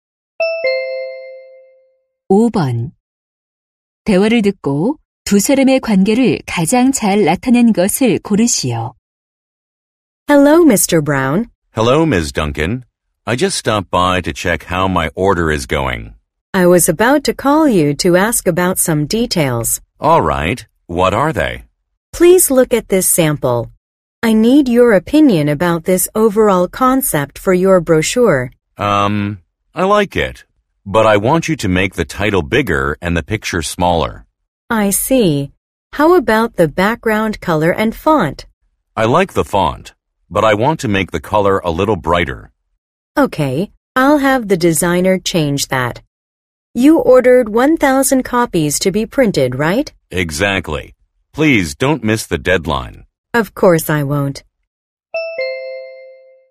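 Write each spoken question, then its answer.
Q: 대화를 듣고 두 사람의 관계를 가장 잘 나타낸 것을 고르시오.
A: 고객 - 인쇄소(브로셔 제작) 직원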